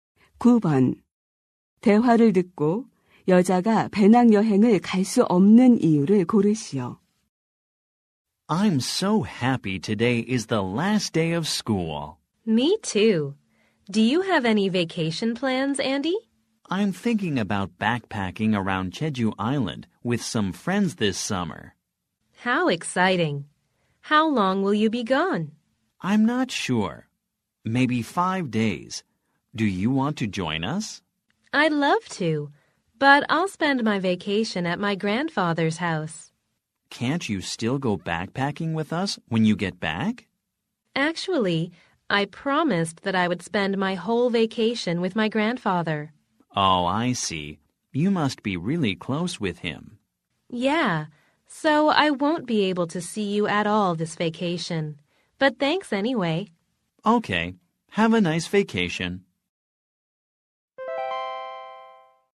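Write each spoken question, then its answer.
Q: 대화를 듣고 여자가 배낭여행을 갈 수 없는 이유를 고르시오.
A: 방학 내내 할아버지와 함께 지내기로 약속해서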